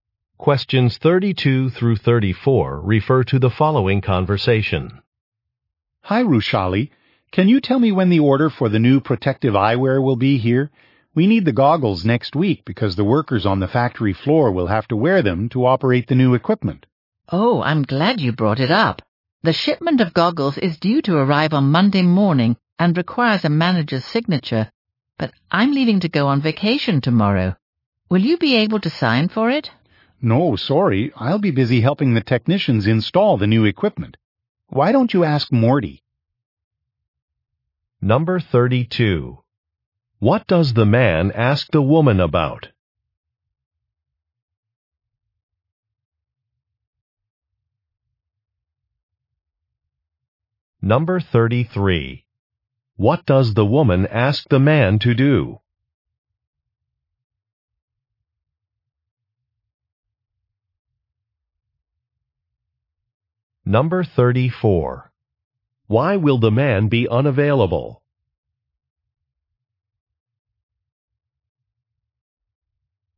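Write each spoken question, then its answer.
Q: What does the man ask the woman about?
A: When the order of new protective goggles will arrive

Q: What does the woman ask the man to do?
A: Sign for the shipment

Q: Why will the man be unavailable?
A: He will be helping technicians install new equipment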